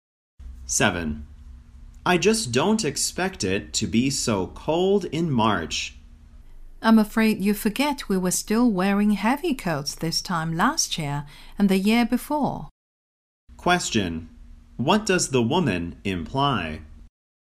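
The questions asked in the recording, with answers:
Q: What does the woman imply?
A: It's usually cold in March.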